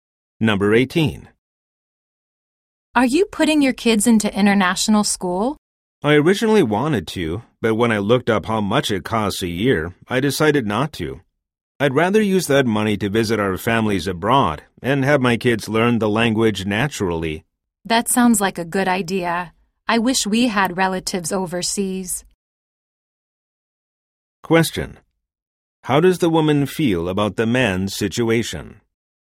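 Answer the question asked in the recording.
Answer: Envious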